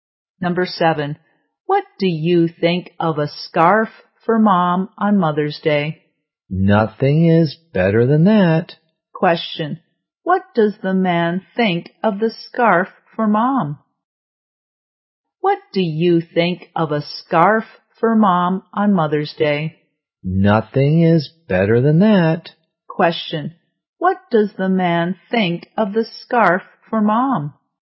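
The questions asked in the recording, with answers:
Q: Question, what does the man think of the scarf for Mom?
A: It's the best gift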